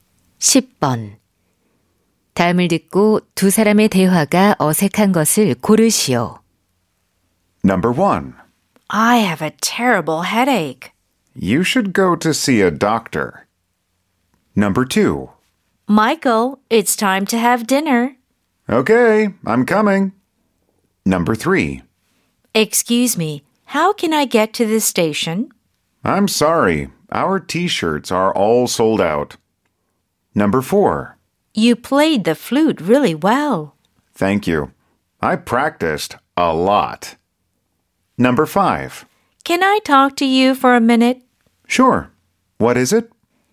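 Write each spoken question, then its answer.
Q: 다음을 듣고 두 사람의 대화가 어색한 것을 고르시오.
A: 3번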